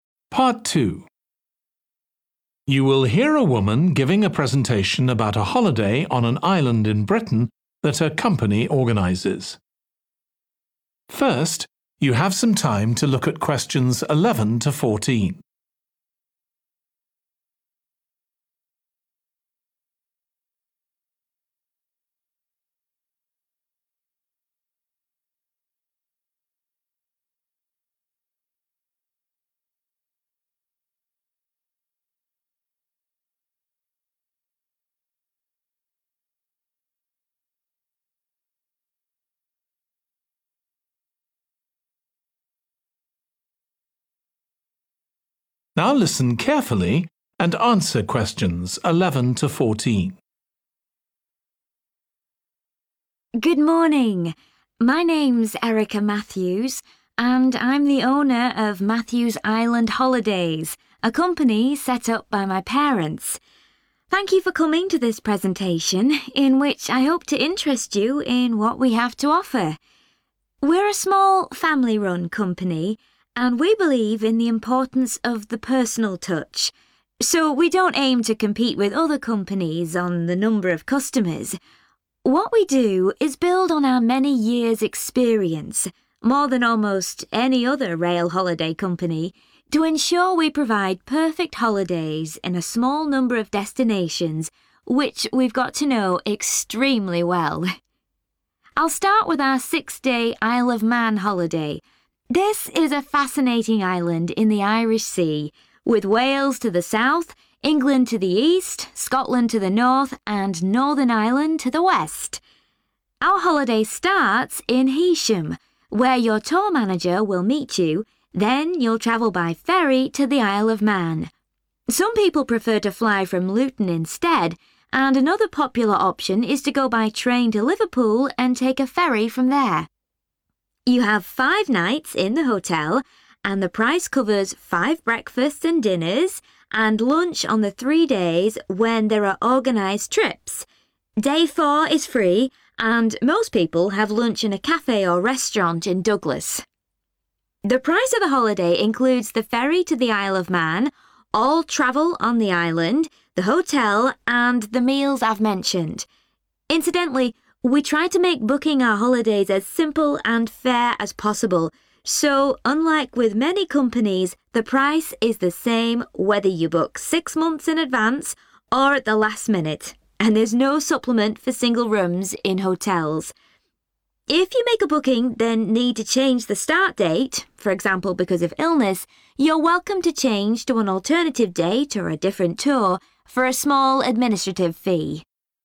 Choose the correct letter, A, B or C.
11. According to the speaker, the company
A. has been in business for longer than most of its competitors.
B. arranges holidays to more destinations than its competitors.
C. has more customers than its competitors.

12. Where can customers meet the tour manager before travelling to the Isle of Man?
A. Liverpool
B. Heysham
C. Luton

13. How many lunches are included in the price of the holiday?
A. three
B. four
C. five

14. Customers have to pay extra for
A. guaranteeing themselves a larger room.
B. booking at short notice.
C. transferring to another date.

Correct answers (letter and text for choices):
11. A. has been in business for longer than most of its competitors.
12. B. Heysham
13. A. three
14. C. transferring to another date.

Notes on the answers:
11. What we do is build on our many years' experience – more than almost any other rail holiday company Excerpt/Transcript Explanation: The transcript means that the company has a lot of experience compared to almost all other rail holiday companies. Answer Explanation: The answer suggests that the company has been in business longer than most of its competitors. Reason For Correctness: The correct answer is A because the excerpt states that the company has more years of experience than almost any other rail holiday company. This implies that the company has been in business for a longer period compared to its competitors.
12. Our holiday starts in Heysham, where your tour manager will meet you Excerpt/Transcript Explanation: The transcript mentions that the holiday begins in Heysham, and that is where the tour manager will be waiting for customers. Answer Explanation: The answer indicates that customers can meet the tour manager in Heysham. Reason For Correctness: The correct answer is B because according to the excerpt, the tour manager will meet customers in Heysham before traveling to the Isle of Man, as stated in the provided information.
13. The transcript says that the price of the holiday includes five nights in the hotel. It also mentions that the price covers five breakfasts and dinners, as well as lunch on three specific days when there are organized trips. Answer Explanation: The answer 'A' means that three lunches are included in the price of the holiday. Reason For Correctness: The correct answer is 'A' because the excerpt clearly states that lunch is provided on only three days when there are organized trips, correlating with the option 'three lunches.' Therefore, 'A' is the correct choice based on the information provided.
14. The transcript says that if you need to change the start date of your booking due to reasons like being sick, you can switch to a different date or tour by paying a small administrative fee. Answer Explanation: The answer choice C is about transferring to another date, which matches the situation described in the excerpt where customers can change their start date by paying a fee. Reason For Correctness: The correct answer is C because it directly relates to the option given in the excerpt, which mentions customers being able to transfer to another date by paying a fee if needed.

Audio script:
Good morning. My name's Erica Matthews, and I'm the owner of Matthews Island Holidays, a company set up by my parents. Thank you for coming to this presentation, in which I hope to interest you in what we have to offer. We're a small, family-run company, and we believe in the importance of the personal touch, so we don't aim to compete with other companies on the number of customers. What we do is build on our many years' experience – more than almost any other rail holiday company – to ensure we provide perfect holidays in a small number of destinations, which we've got to know extremely well.
I'll start with our six-day Isle of Man holiday. This is a fascinating island in the Irish Sea, with Wales to the south, England to the east, Scotland to the north and Northern Ireland to the west. Our holiday starts in Heysham, where your tour manager will meet you, then you'll travel by ferry to the Isle of Man. Some people prefer to fly from Luton instead, and another popular option is to go by train to Liverpool and take a ferry from there.
You have five nights in the hotel, and the price covers five breakfasts and dinners, and lunch on the three days when there are organised trips: day four is free, and most people have lunch in a café or restaurant in Douglas.
The price of the holiday includes the ferry to the Isle of Man, all travel on the island, the hotel, and the meals I've mentioned. Incidentally, we try to make booking our holidays as simple and fair as possible, so unlike with many companies, the price is the same whether you book six months in advance or at the last minute, and there's no supplement for single rooms in hotels. If you make a booking then need to change the start date, for example because of illness, you're welcome to change to an alternative date or a different tour, for a small administrative fee.